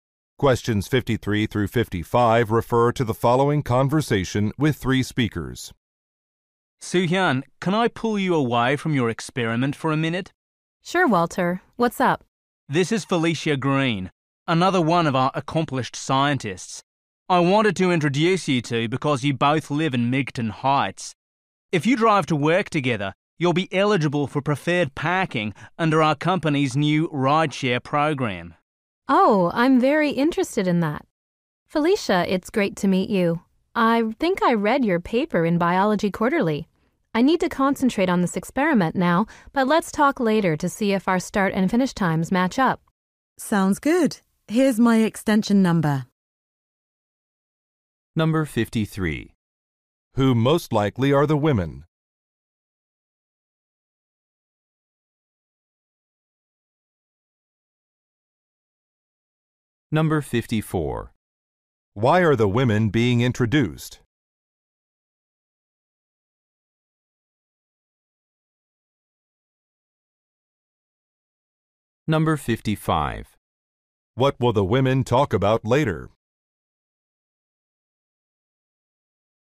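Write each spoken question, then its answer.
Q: Who most likely are the women?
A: Scientists

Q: Why are the women being introduced?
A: They could share rides to work

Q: What will the women talk about later?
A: Their work schedules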